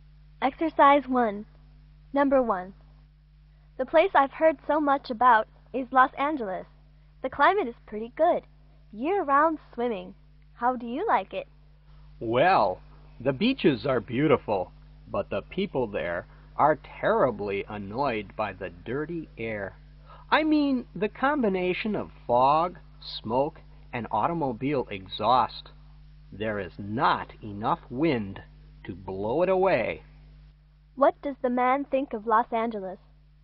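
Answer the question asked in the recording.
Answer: The beaches are beautiful, but the air is dirty.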